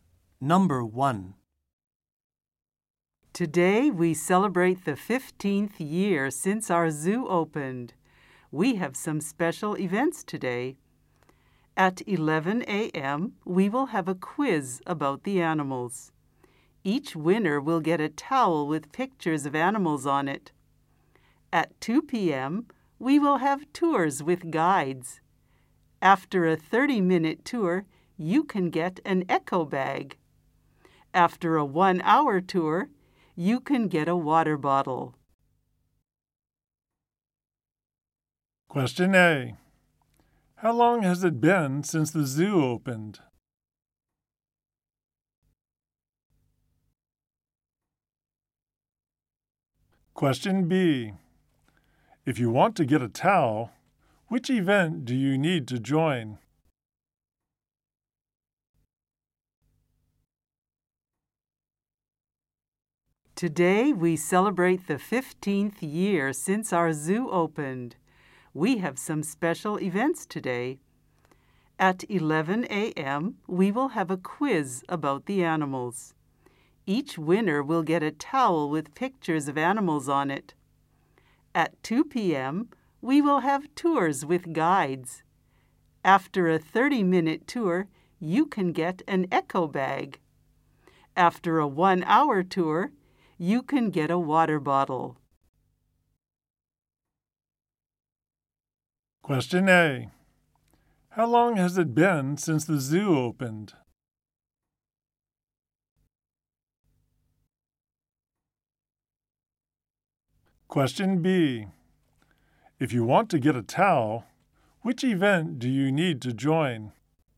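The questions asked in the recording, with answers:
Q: How long has it been since the zoo opened?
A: 15 years

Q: If you want to get a towel, which event do you need to join?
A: The quiz about the animals at 11 a.m.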